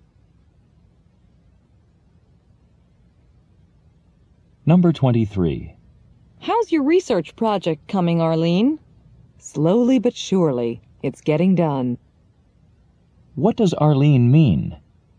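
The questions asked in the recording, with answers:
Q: What does Arlene mean?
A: Her project is going slowly, but it is making steady progress.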